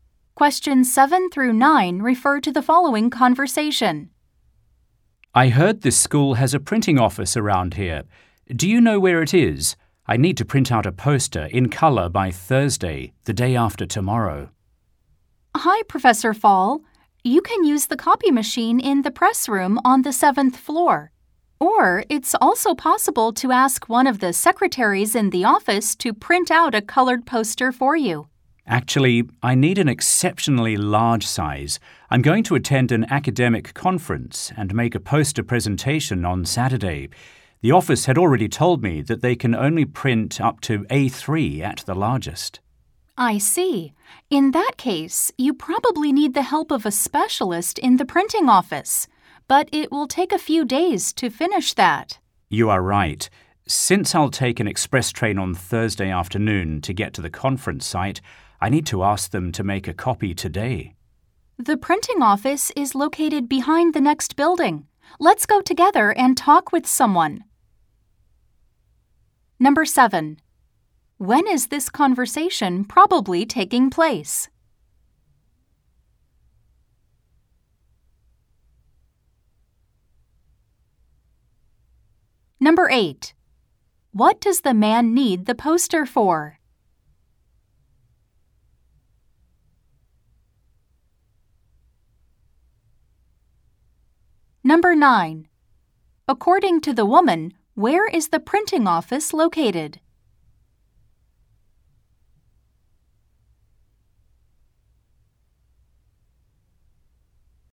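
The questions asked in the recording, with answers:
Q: When is this conversation probably taking place?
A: On Tuesday

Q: What does the man need the poster for?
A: A poster presentation at an academic conference

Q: According to the woman, where is the printing office located?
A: Behind the next building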